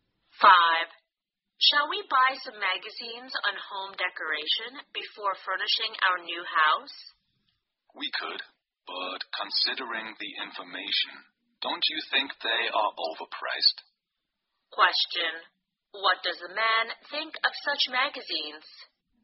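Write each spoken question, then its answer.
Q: What does the man think of such magazines?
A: They are overpriced.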